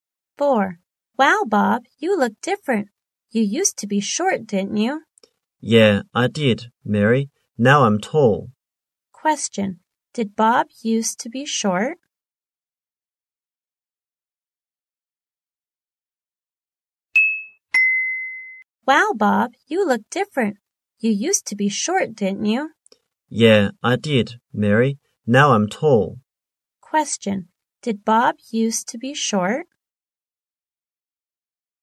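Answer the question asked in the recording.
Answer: Yes, he did.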